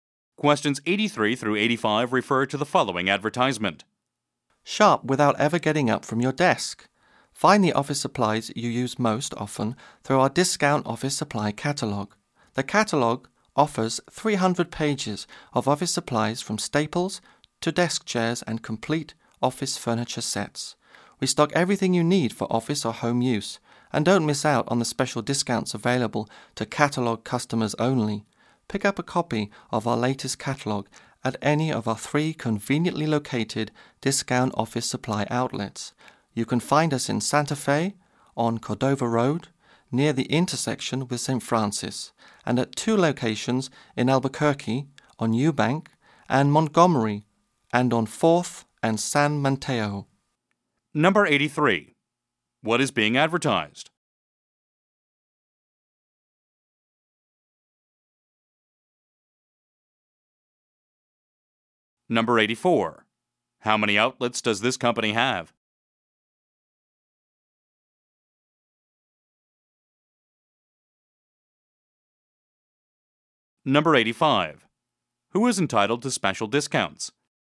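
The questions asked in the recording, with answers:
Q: What is being advertised?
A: A discount office supply catalogue

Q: How many outlets does this company have?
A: Three

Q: Who is entitled to special discounts?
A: Catalogue customers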